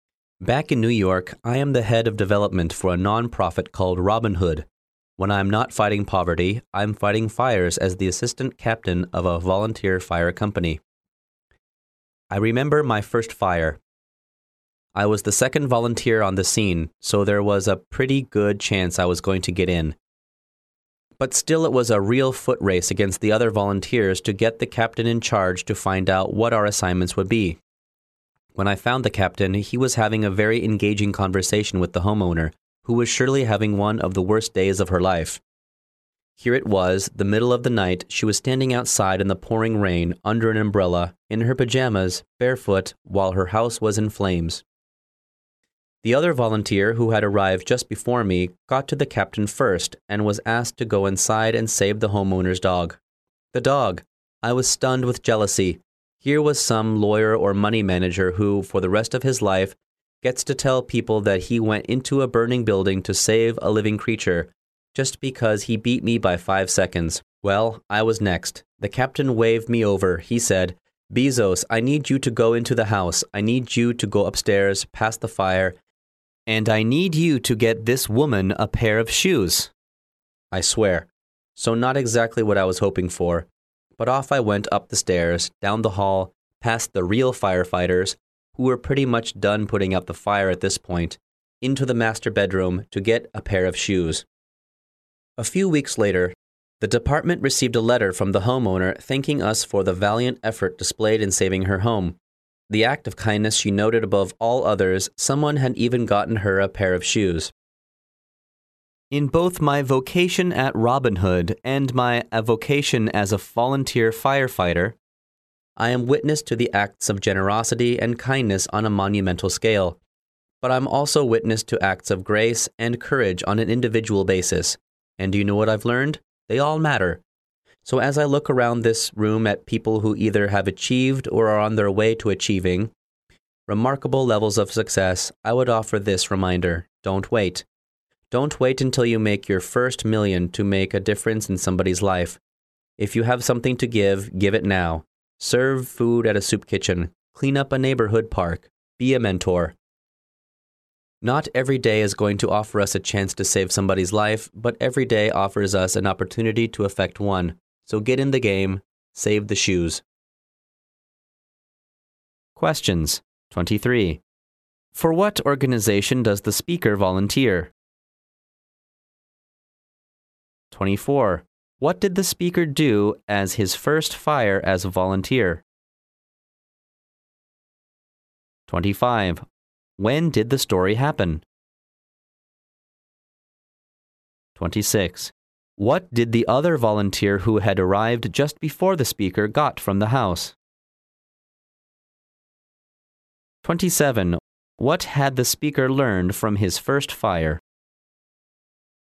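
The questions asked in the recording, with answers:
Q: For what organization does the speaker volunteer?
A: A volunteer fire company

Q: What did the speaker do as his first fire as a volunteer?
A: He got the homeowner a pair of shoes

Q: When did the story happen?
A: In the middle of the night

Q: What did the other volunteer who had arrived just before the speaker got from the house?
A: The homeowner's dog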